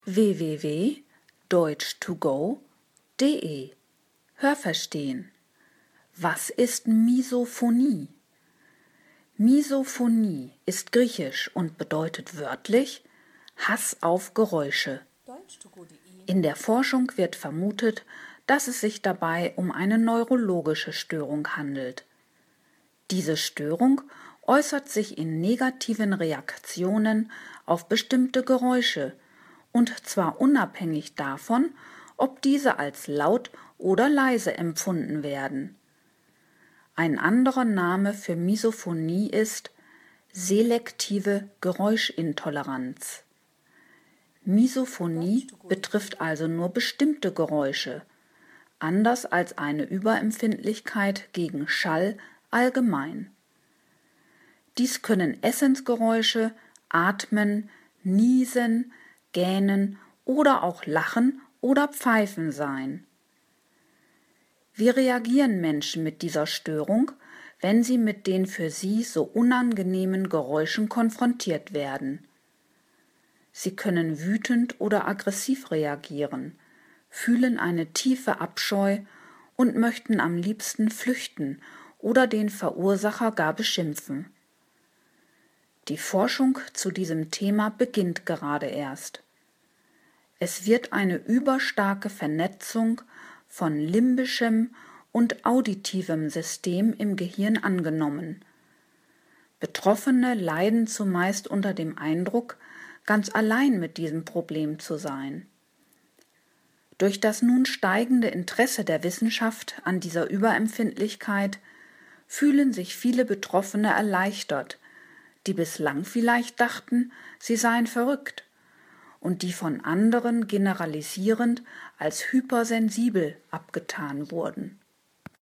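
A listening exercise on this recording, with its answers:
Haben Sie das gehört? Stimmt diese Aussage?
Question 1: Es wird angenommen, dass Misophonie eine neurologische Beeinträchtigung ist.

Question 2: Laute Geräusche rufen bei manchen Menschen negative Reaktionen hervor.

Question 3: Misophonie ist eine Überempfindlichkeit gegen Schall.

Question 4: Geräusche, die beim Essn erzeugt werden, können Laute sein, die für unter Misophonie Leidende nur schwer erträglich sind.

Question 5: Die Konfrontation mit bestimmten Geräuschen kann bei manchen Menschen Aggressionen auslösen.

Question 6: Schon seit einger Zeit wird zu dem Thema „Misophonie" geforscht.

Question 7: Für Wissenschaftler kommt eine übermäßig ausgeprägte Verflechtung von auditivem und limbischem System im Gehirn als Ursache für Misophonie in Betracht.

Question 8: Von Misophonie Betroffene sind allein mit diesem Problem.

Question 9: Menschen, die unter Misophonie leiden, sind verrückt.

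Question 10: Andere tun unter Misophonie Leidende eventuell verallgemeinernd als übersensibel ab.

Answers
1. Richtig
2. Falsch
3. Falsch
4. Richtig
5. Richtig
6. Falsch
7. Richtig
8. Falsch
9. Falsch
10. Richtig

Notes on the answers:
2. Bestimmte Geräusche rufen unabhängig von der Lautstärke bei einigen Menschen negative Reaktionen hervor.
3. De Intoleranz gegenüber Geräuschen ist selektiv, d.h. betrifft nur spezifische Geräusche, nicht Schall allhgemein.
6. Die Forschung beginnt gerade erst.
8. Sie leiden unter dem Eindruck, damit allein zu sein. Das heißt nicht, dass es keine anderen Betroffenen gibt.
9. Sie sind nicht verrückt, aber sie denken dies vielleicht manchmal.

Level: C (schwer)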